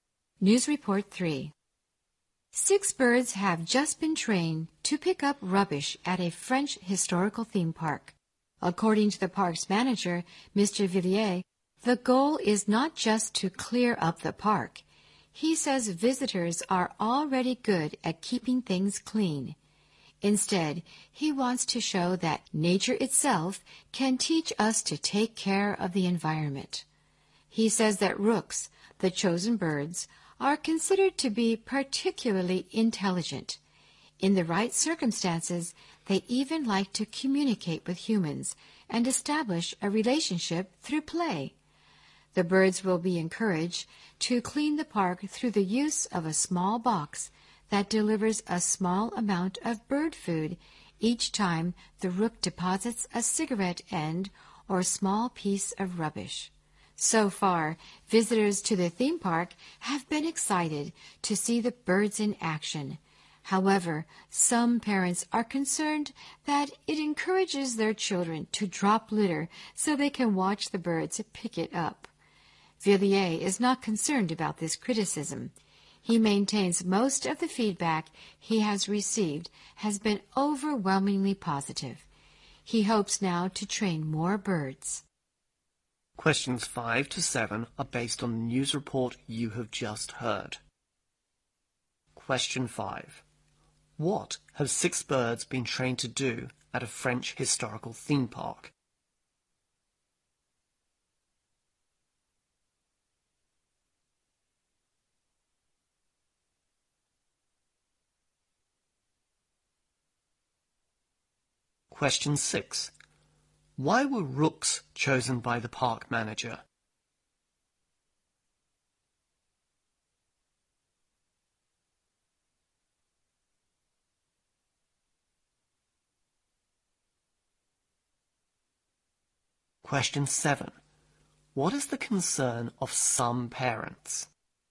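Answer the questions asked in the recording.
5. Pick up rubbish
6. They are considered particularly intelligent
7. It may encourage children to drop litter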